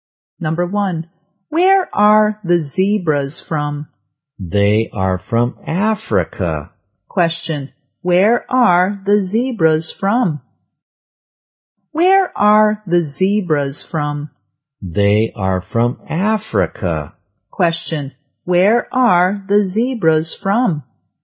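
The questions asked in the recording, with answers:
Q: Question, where are the zebras from?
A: Africa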